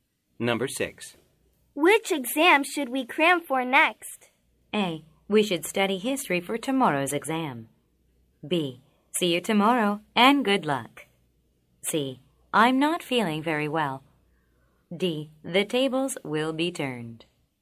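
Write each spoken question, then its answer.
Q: Which exam should we cram for next?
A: A: We should study history for tomorrow's exam.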